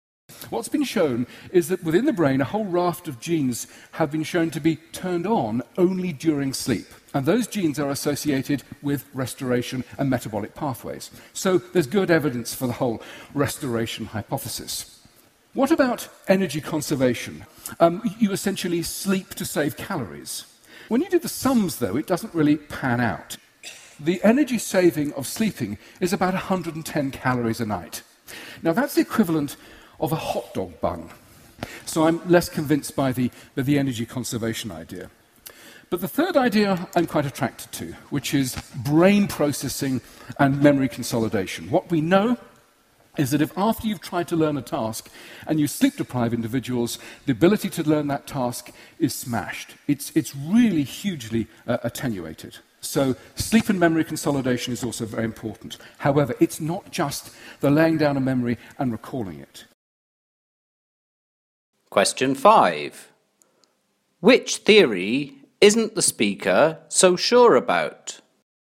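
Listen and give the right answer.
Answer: Energy conservation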